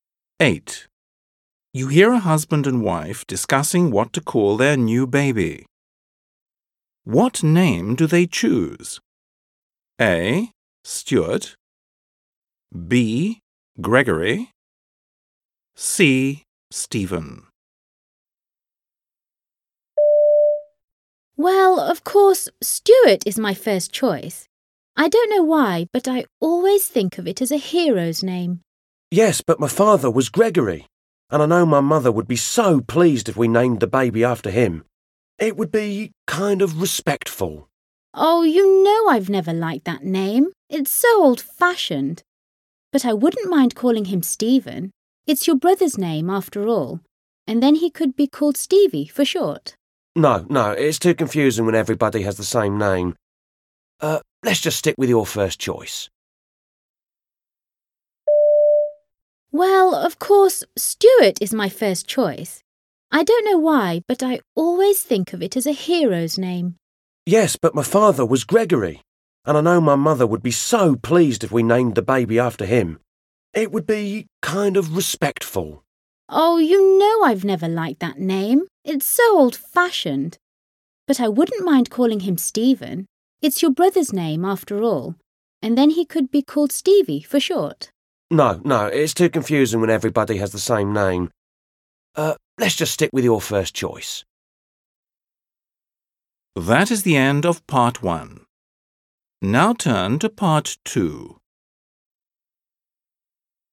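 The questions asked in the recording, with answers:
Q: What name do they choose? A. Stuart. B. Gregory. C. Stephen.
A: A: Stuart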